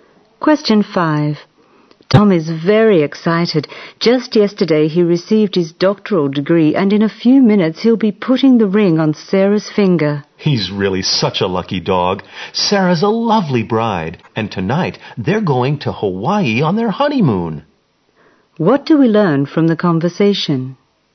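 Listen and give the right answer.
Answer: Tom just got his doctorate and is getting married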